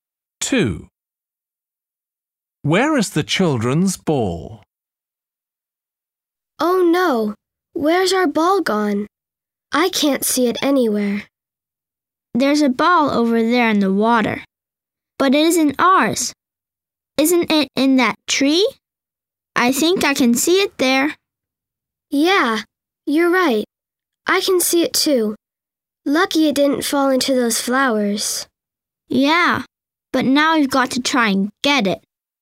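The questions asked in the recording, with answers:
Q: Where is the children's ball?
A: in a tree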